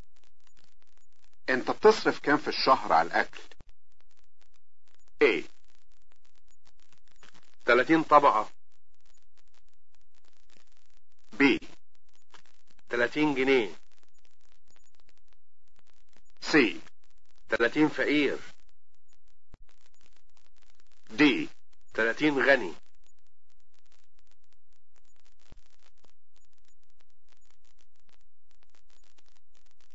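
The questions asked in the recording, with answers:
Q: انت بتصرف كام في الشهر على الاكل؟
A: B: تلاتين جنيه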